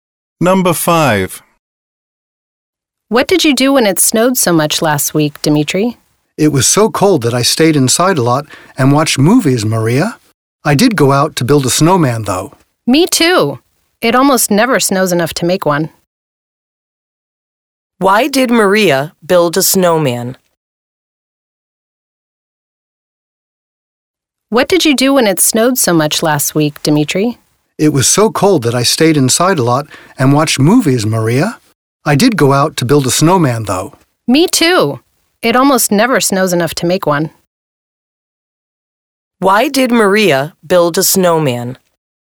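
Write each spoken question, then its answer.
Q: Why did Maria build a snowman?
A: It almost never snows enough to make one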